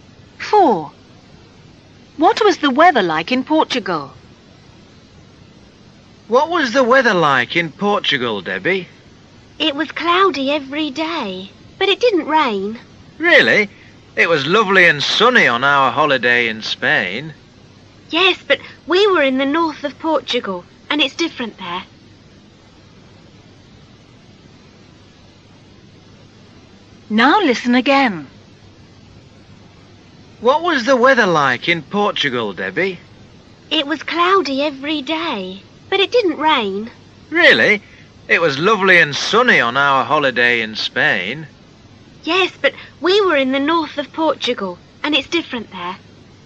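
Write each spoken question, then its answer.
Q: What was the weather like in Portugal?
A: Cloudy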